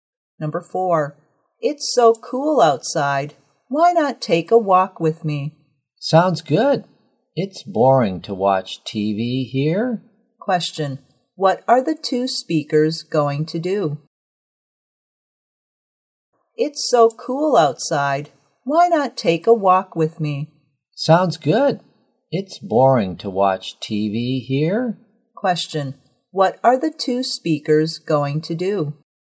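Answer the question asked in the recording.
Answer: Take a walk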